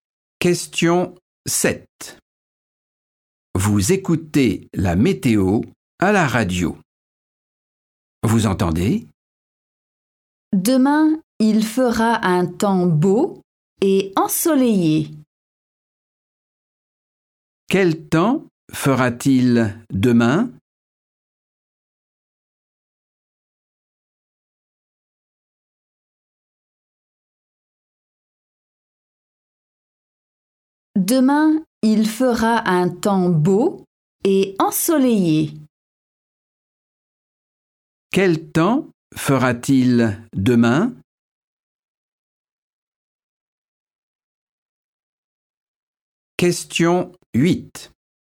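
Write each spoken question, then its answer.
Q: Quel temps fera-t-il demain?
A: beau et ensoleillé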